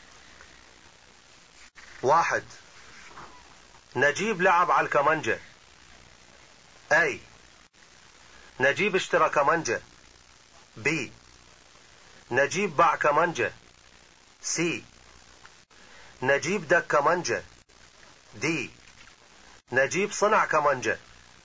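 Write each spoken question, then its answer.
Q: واحد. نجيب لعب على الكمانجة.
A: C: نجيب دك كمانجة.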